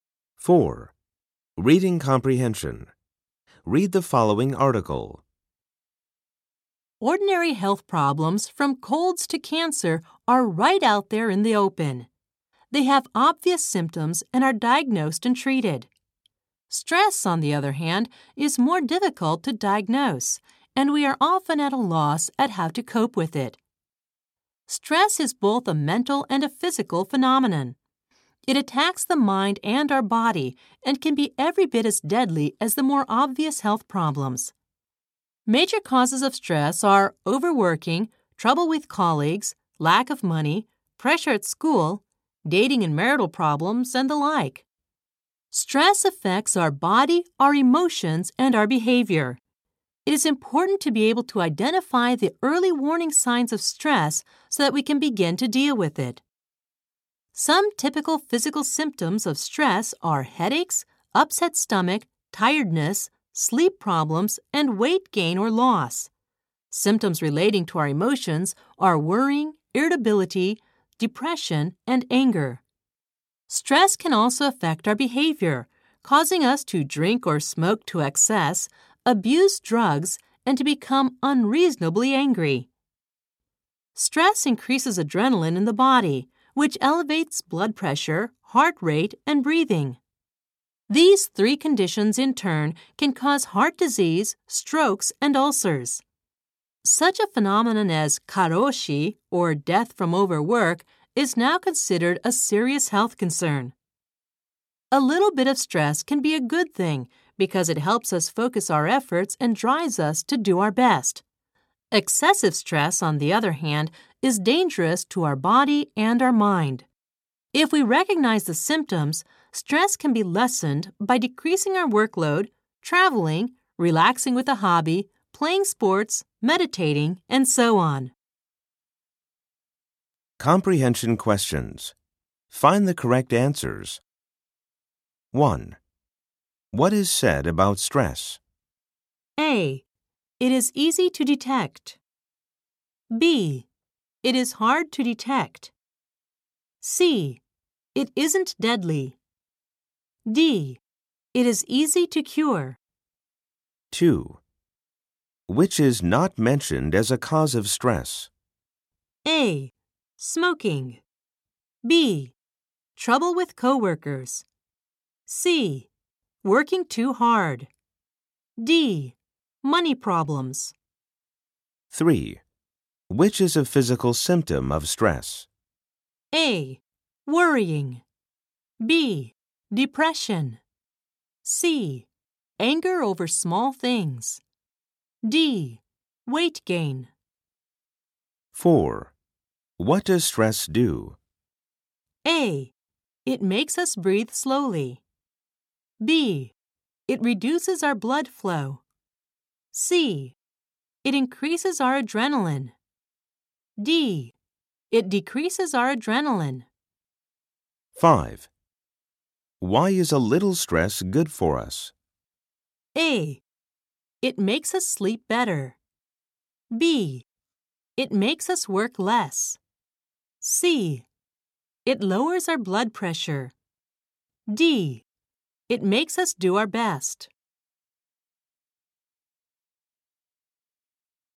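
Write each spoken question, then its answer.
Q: What is said about stress?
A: B: It is hard to detect.

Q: Which is not mentioned as a cause of stress?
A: A: Smoking.

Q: Which is a physical symptom of stress?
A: D: Weight gain.

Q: What does stress do?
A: C: It increases our adrenaline.

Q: Why is a little stress good for us?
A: D: It makes us do our best.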